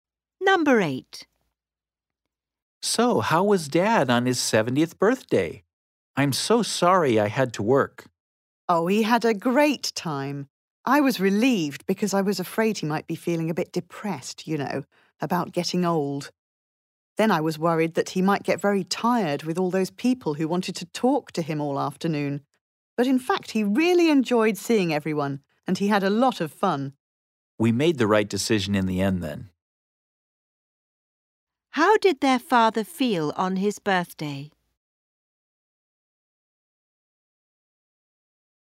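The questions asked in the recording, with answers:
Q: How did their father feel on his birthday?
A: Happy; he enjoyed himself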